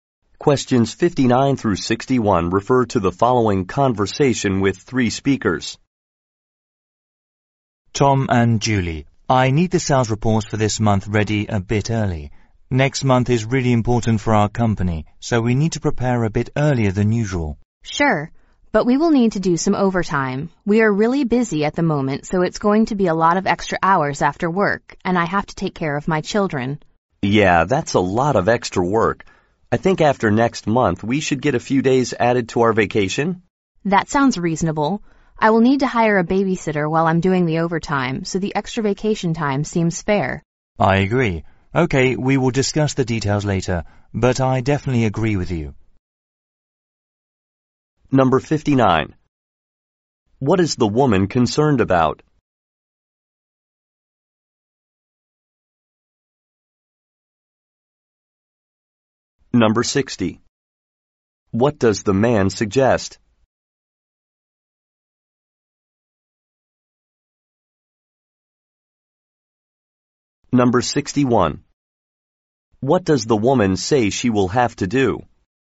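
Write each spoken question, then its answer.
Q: What does the man suggest?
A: Adding a few days to their vacation

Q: What does the woman say she will have to do?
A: Hire a babysitter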